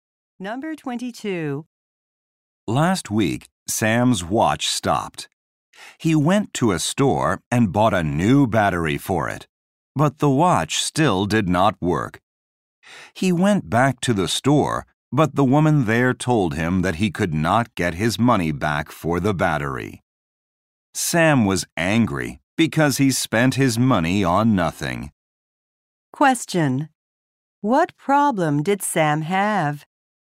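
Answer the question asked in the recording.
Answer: His watch still didn't work after a new battery.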